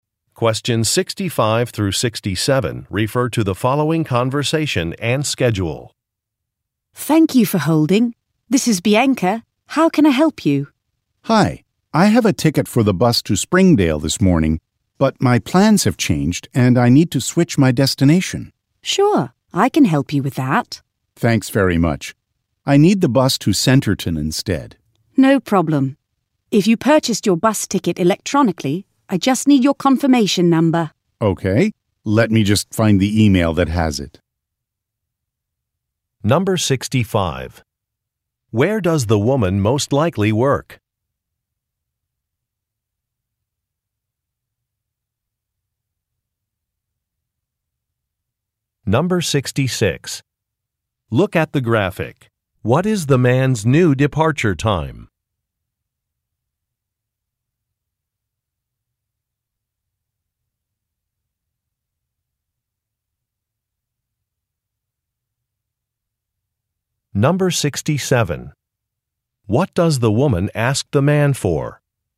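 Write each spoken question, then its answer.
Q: Where does the woman most likely work?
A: At a bus company

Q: What does the woman ask the man for?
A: A confirmation number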